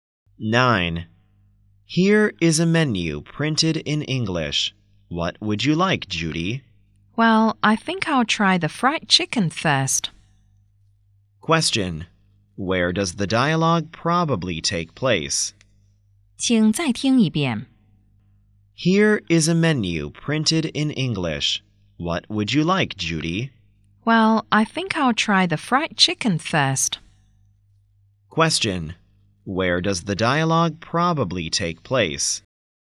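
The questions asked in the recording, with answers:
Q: Question. Where does the dialogue probably take place?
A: In a restaurant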